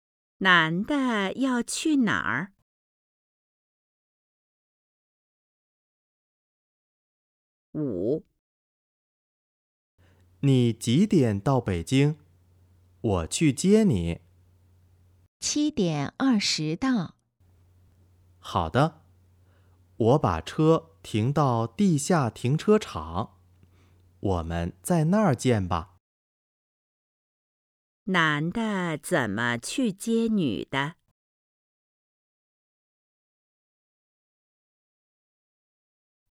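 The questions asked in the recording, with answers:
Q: 男的怎么去接女的?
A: 开车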